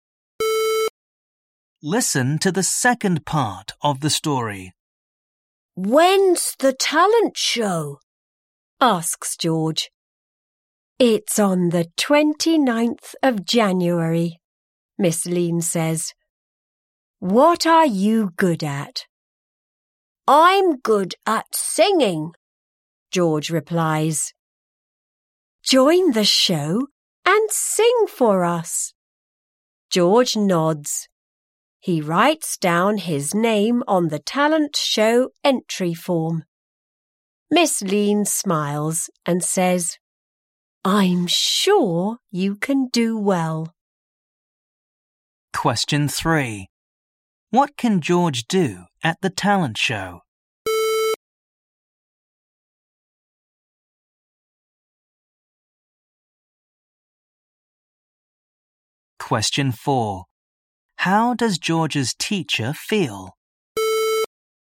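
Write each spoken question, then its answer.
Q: What can George do at the talent show?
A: Sing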